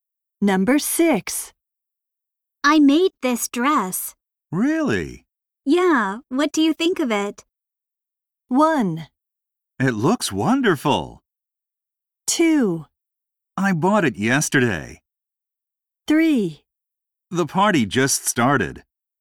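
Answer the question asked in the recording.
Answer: 1: It looks wonderful.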